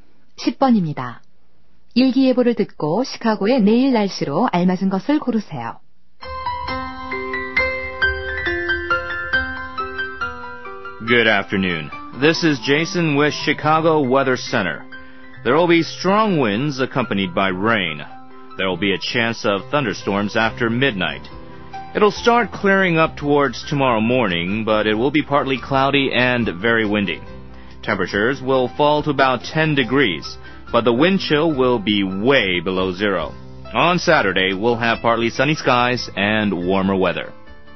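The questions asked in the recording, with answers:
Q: 일기예보를 듣고 시카고의 내일 날씨로 알맞은 것을 고르세요.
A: 부분적으로 흐리고 바람이 매우 강함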